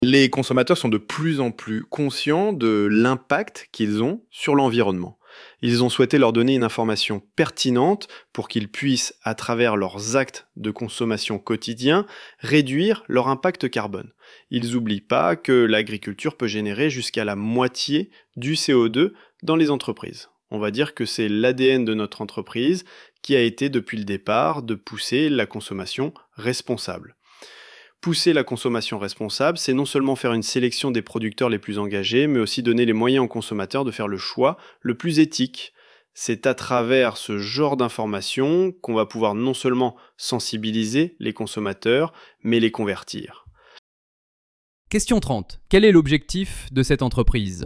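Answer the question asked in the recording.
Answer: Encourager une consommation responsable en informant les consommateurs sur leur impact carbone.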